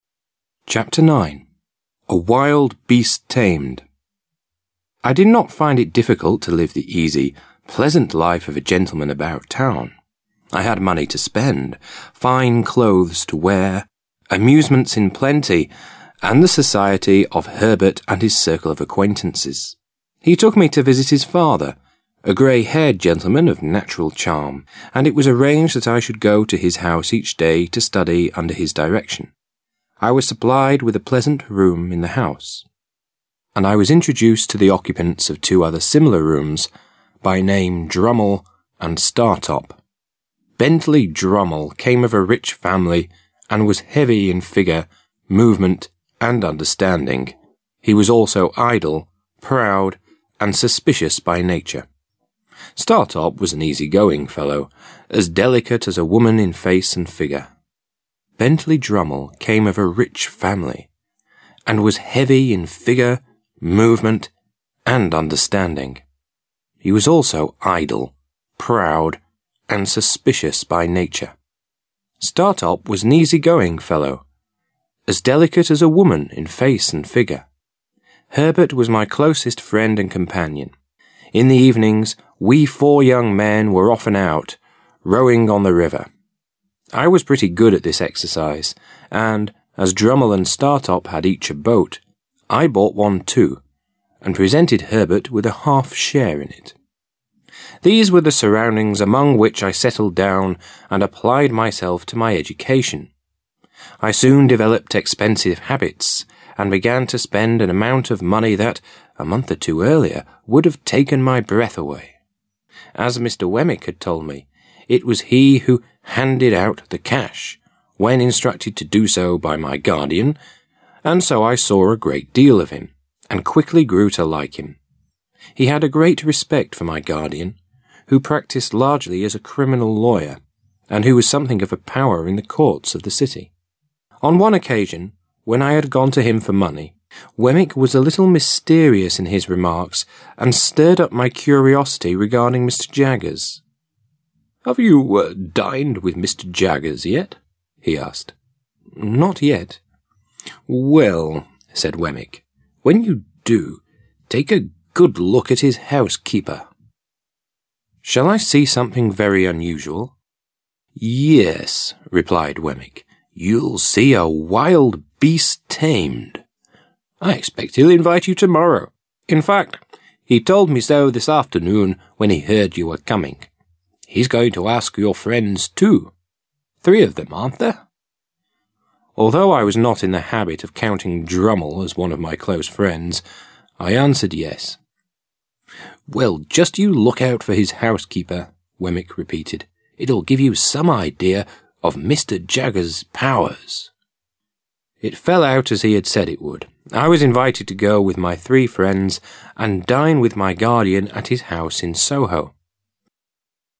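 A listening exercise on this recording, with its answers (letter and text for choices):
Task 1. You are going to listen to the 1st part of the 9th chapter of the story. Fill in the gaps with the missing words that are given in the table.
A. idle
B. under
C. of natural charm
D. look at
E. by nature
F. acquaintances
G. in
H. arranged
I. occupants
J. settled down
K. habits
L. respect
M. taken my breath away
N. handed out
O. in the habit of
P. occasion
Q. stirred up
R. tamed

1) I had money to spend, fine clothes to wear, amusements in plenty, and the society of Herbert and his circle of ______________________.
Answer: F. acquaintances

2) I was supplied with a pleasant room in the house; and I was introduced to the __________________ of two other similar rooms, by name Drummle and Startop.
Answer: I. occupants

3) These were the surroundings among which I ____________________and applied myself to my education.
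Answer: J. settled down

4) As Mr. Wemmick had told me, it was he who "_______________________the cash"—when instructed to do so by my guardian—and so I saw a great deal of him, and quickly grew to like him.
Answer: N. handed out

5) He had a great ________________ for my guardian, who practised largely as a criminal lawyer, and who was something of a power in the Courts of the city.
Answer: L. respect

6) "Well," said Wemmick, "when you do, take a good _______________his housekeeper."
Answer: D. look at

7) "Yes," replied Wemmick, "you'll see a wild beast ______________.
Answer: R. tamed

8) Although I was not _______________________counting Drummle as one of my close friends, I answered, "Yes."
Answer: O. in the habit of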